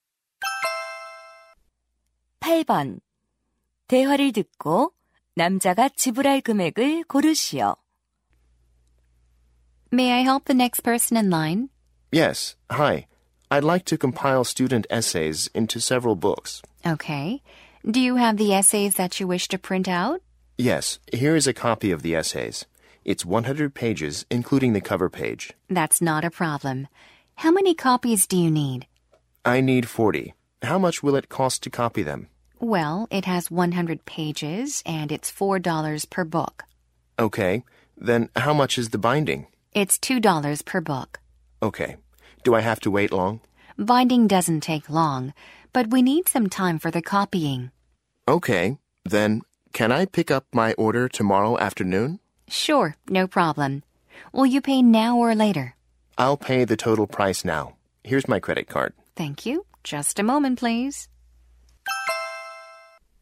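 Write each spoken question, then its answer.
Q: 대화를 듣고 남자가 지불할 금액을 고르시오.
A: $240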